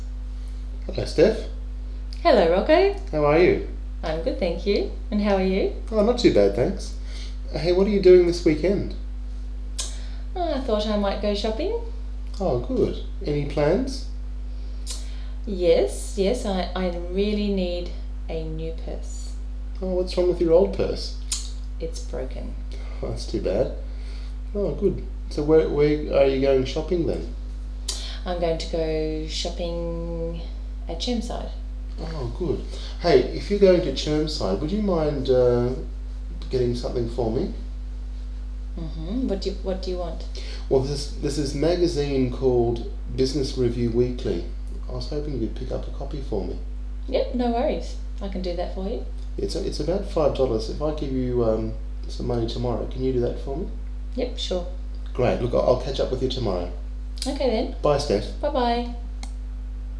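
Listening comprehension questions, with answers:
Listen to the text and answer the questions below:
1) How is Rocco today?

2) What is Steph doing this weekend?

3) What is she going to get? Why?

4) What does Rocco want Steph to do?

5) When are they going to meet next?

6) What is Rocco going to give Steph the next time they meet? Why?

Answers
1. Not too bad.
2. She might go shopping (at Chermside).
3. A new purse, because her old one is broken.
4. Pick up a copy of the magazine Business Review Weekly for him.
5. Tomorrow.
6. About $5, to pay for the magazine.

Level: Level 4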